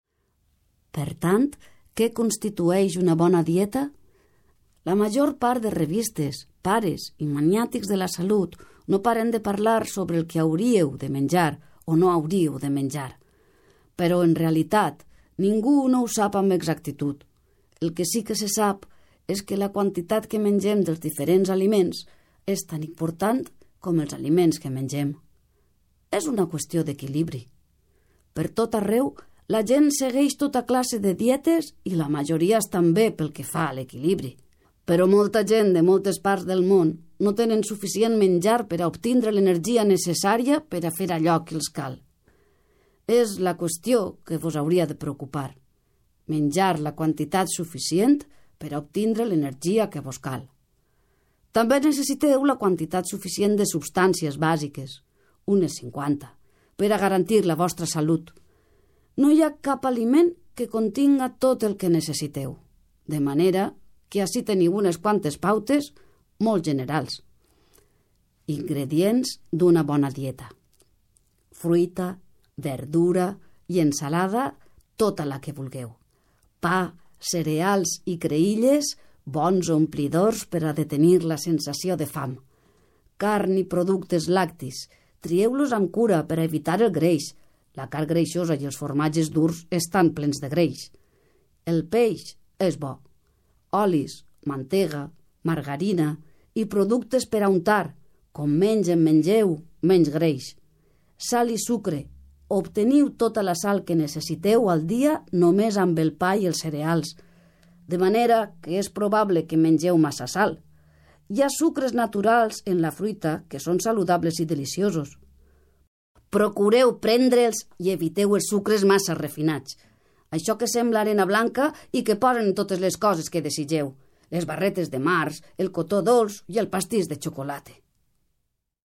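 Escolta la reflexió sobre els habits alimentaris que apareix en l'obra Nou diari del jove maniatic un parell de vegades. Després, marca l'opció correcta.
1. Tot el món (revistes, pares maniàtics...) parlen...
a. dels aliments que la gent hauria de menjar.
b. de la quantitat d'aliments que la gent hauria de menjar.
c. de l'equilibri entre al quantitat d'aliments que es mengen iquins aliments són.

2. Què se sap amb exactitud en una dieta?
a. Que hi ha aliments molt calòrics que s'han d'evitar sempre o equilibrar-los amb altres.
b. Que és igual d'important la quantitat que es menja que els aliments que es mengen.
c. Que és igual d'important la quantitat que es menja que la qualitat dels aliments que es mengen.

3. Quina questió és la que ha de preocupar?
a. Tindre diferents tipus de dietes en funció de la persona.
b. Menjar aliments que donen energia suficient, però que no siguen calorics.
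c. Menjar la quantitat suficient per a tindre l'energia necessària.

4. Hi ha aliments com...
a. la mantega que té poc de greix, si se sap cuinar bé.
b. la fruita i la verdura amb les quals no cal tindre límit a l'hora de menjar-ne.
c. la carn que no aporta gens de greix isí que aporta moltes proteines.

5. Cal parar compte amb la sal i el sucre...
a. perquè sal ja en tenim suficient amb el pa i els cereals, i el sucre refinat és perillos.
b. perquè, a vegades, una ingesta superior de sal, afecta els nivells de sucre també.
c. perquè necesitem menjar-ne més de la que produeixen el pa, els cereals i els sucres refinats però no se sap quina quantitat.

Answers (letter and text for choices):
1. a. dels aliments que la gent hauria de menjar.
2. b. Que és igual d'important la quantitat que es menja que els aliments que es mengen.
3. c. Menjar la quantitat suficient per a tindre l'energia necessària.
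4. b. la fruita i la verdura amb les quals no cal tindre límit a l'hora de menjar-ne.
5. a. perquè sal ja en tenim suficient amb el pa i els cereals, i el sucre refinat és perillos.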